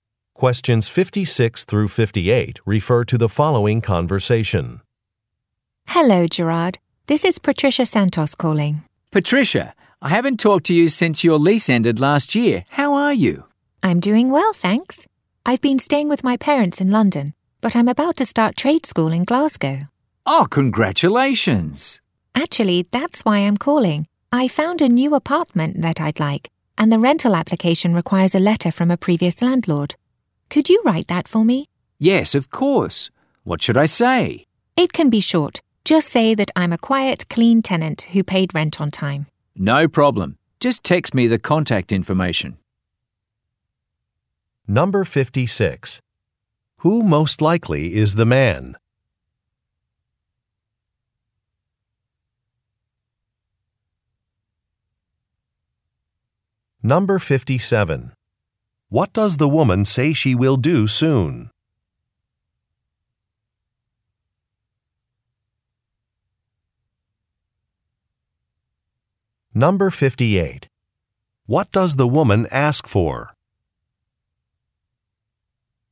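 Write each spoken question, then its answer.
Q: Who most likely is the man?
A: The woman's former landlord

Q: What does the woman say she will do soon?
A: Start trade school in Glasgow

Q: What does the woman ask for?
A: A reference letter for a rental application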